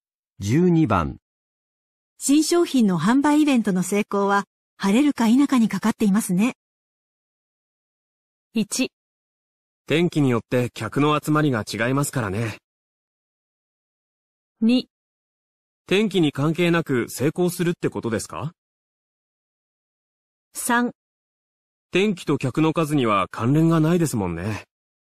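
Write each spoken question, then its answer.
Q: 新商品の販売イベントの成功は、晴れるか否かにかかっていますね。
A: 1: 天気によって客の集まりが違いますからね。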